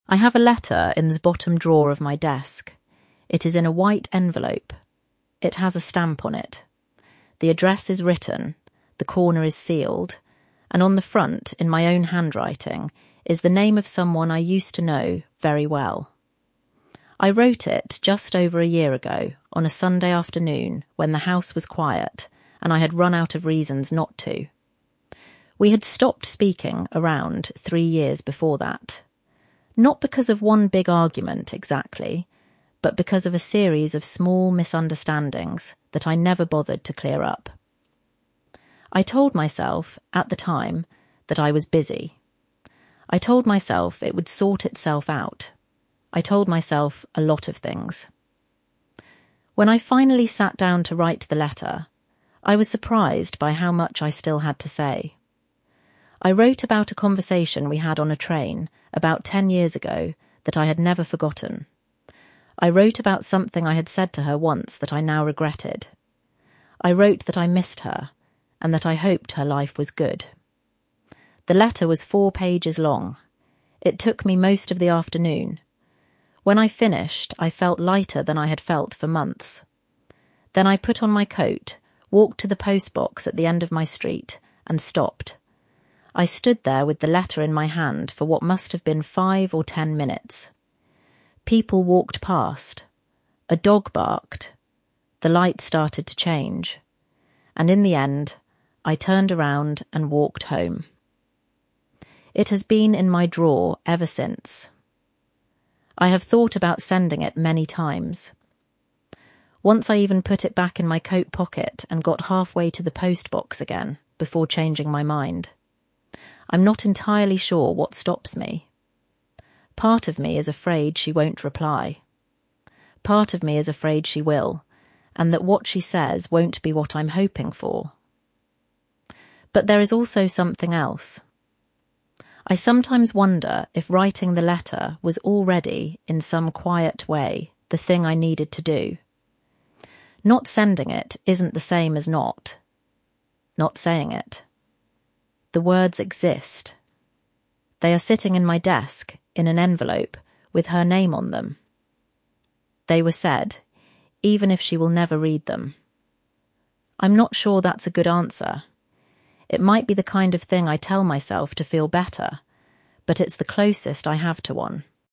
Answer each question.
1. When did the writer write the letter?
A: Just over a year ago, on a Sunday afternoon.

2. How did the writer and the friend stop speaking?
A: Not because of one big argument, but because of a series of small misunderstandings that the writer never bothered to clear up.

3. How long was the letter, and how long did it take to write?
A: Four pages long; it took most of the afternoon.

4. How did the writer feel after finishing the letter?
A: Lighter than they had felt for months.

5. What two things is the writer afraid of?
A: (1) That she won't reply. (2) That she will, and that what she says won't be what the writer is hoping for.

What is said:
I have a letter in the bottom drawer of my desk. It is in a white envelope. It has a stamp on it. The address is written, the corner is sealed, and on the front, in my own handwriting, is the name of someone I used to know very well.
I wrote it just over a year ago, on a Sunday afternoon when the house was quiet and I had run out of reasons not to. We had stopped speaking around three years before that — not because of one big argument, exactly, but because of a series of small misunderstandings that I never bothered to clear up. I told myself, at the time, that I was busy. I told myself it would sort itself out. I told myself a lot of things.
When I finally sat down to write the letter, I was surprised by how much I still had to say. I wrote about a conversation we had on a train, about ten years ago, that I had never forgotten. I wrote about something I had said to her once that I now regretted. I wrote that I missed her, and that I hoped her life was good.
The letter was four pages long. It took me most of the afternoon. When I finished, I felt lighter than I had felt for months.
Then I put on my coat, walked to the post box at the end of my street, and stopped.
I stood there with the letter in my hand for what must have been five or ten minutes. People walked past. A dog barked. The light started to change. And in the end, I turned around and walked home.
It has been in my drawer ever since.
I have thought about sending it many times. Once I even put it back in my coat pocket and got halfway to the post box again, before changing my mind. I'm not entirely sure what stops me. Part of me is afraid she won't reply. Part of me is afraid she will, and that what she says won't be what I'm hoping for.
But there is also something else. I sometimes wonder if writing the letter was already, in some quiet way, the thing I needed to do. Not sending it isn't the same as not saying it. The words exist. They are sitting in my desk, in an envelope, with her name on them. They were said, even if she will never read them.
I'm not sure that's a good answer. It might be the kind of thing I tell myself to feel better. But it's the closest I have to one.